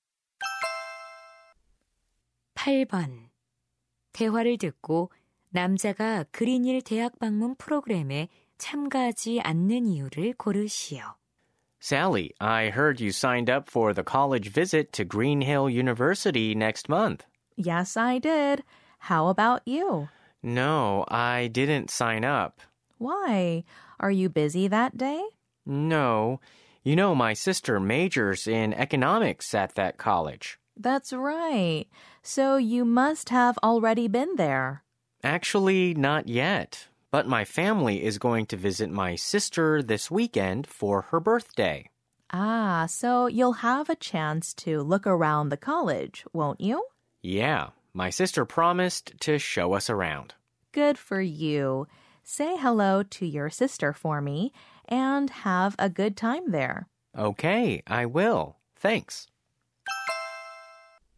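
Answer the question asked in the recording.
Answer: 이번 주말 가족과 함께 누나의 생일에 그 대학에 다니는 누나를 방문하기 때문에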